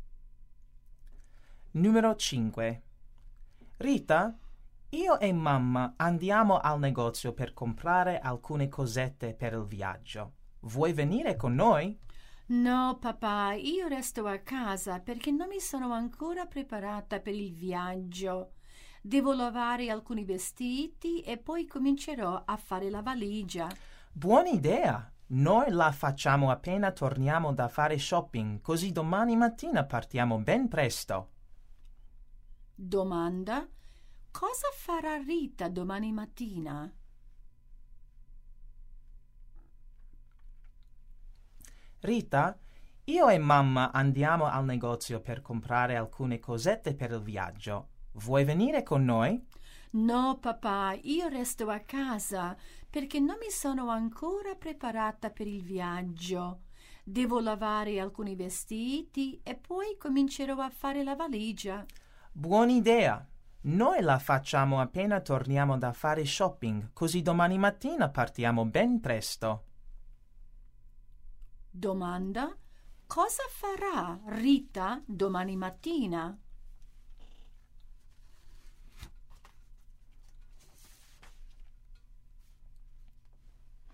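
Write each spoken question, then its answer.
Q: cosa farà Rita domani mattina?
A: Partirà per il viaggio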